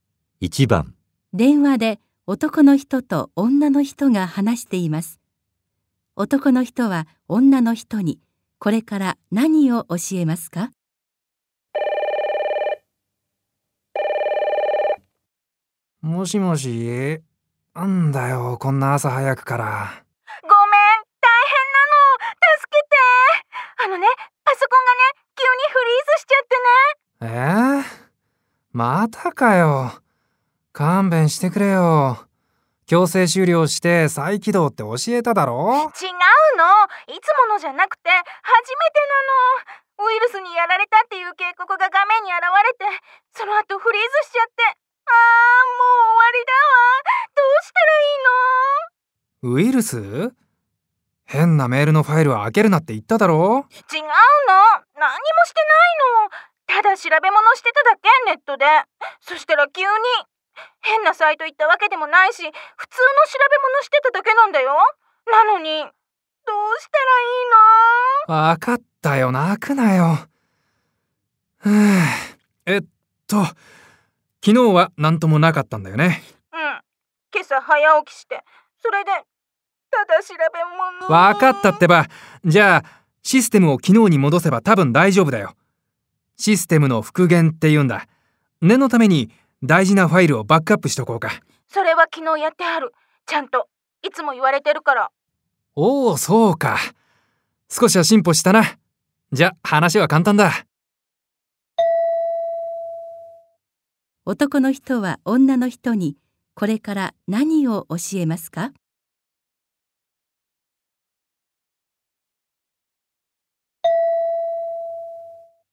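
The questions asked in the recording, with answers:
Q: 男の人は女の人にこれから何を教えますか?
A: システムの復元(システムを昨日の状態に戻す方法)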